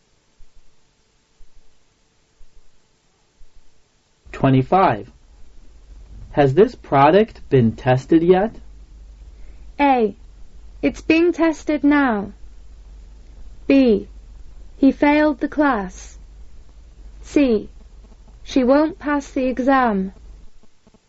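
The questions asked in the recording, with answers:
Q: Has this product been tested yet?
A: A: It's being tested now.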